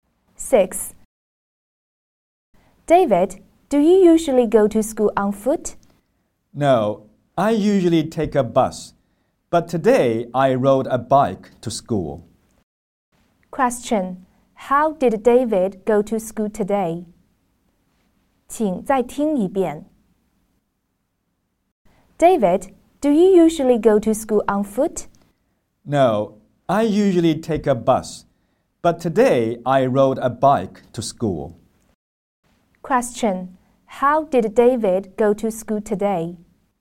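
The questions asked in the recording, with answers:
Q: How did David go to school today?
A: By bike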